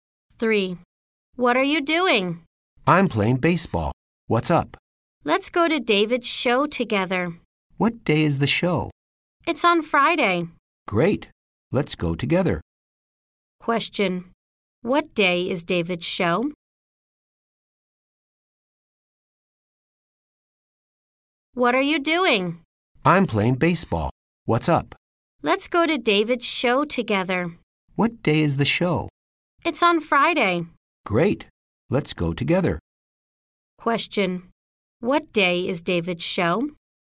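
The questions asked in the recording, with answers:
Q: What day is David's show?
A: Friday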